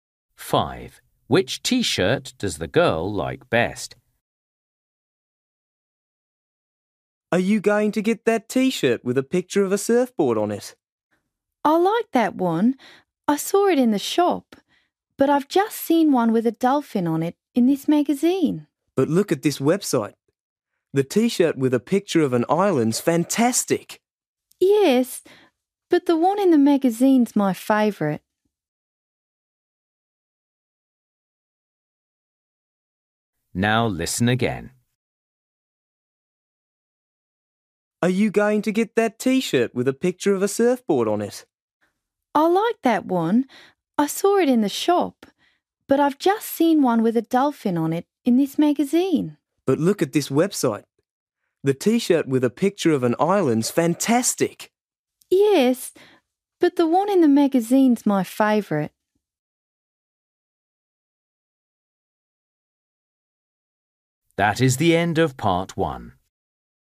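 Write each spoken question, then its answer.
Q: Which T-shirt does the girl like best?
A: The one with a dolphin on it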